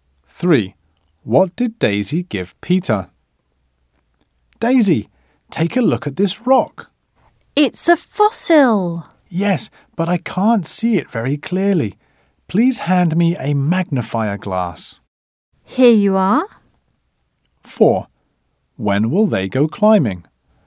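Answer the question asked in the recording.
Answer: A magnifying glass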